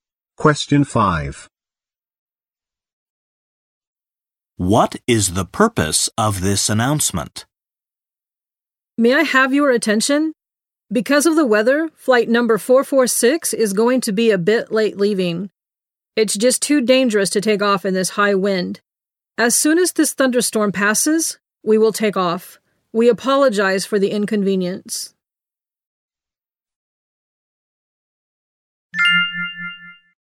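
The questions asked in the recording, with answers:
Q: What is the purpose of this announcement?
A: To announce that the flight is delayed because of the weather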